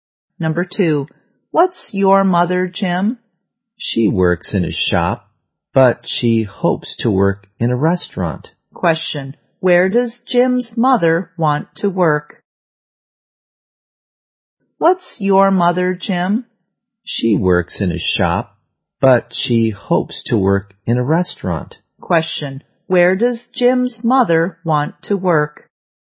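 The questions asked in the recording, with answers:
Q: where does Jim's mother want to work?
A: In a restaurant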